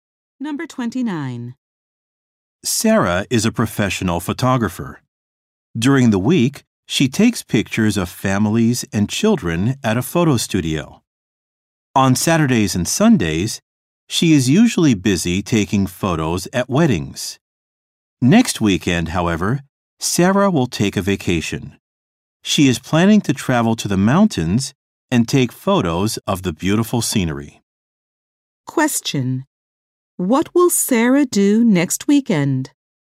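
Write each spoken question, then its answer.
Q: Question: What will Sarah do next weekend?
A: Travel to the mountains and take scenery photos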